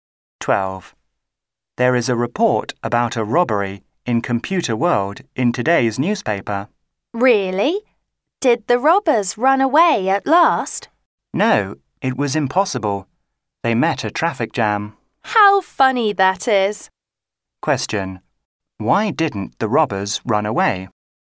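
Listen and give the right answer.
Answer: They met a traffic jam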